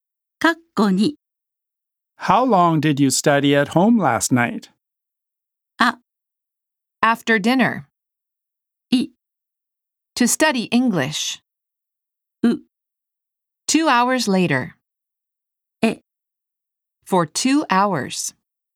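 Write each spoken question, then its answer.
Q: How long did you study at home last night?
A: え: For 2 hours.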